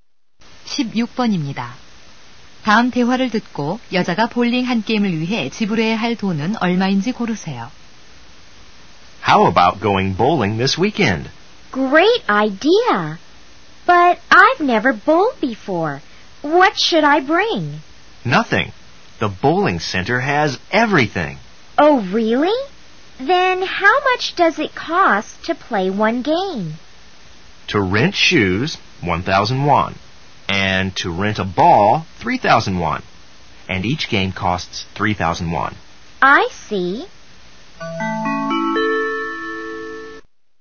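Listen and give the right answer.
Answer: 7,000원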